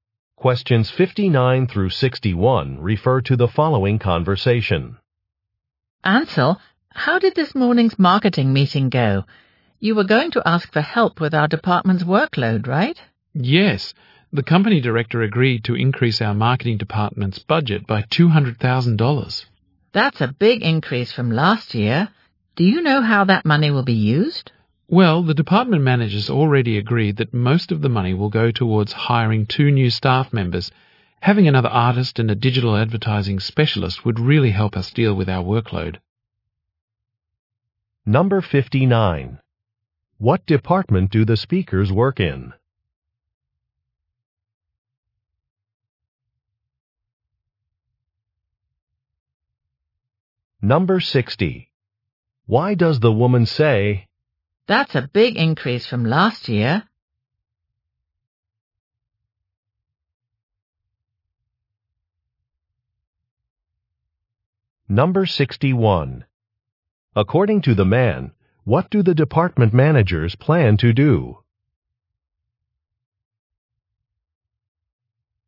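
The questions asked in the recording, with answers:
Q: What department do the speakers work in?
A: Marketing

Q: According to the man, what do the department managers plan to do?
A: Hire two new staff members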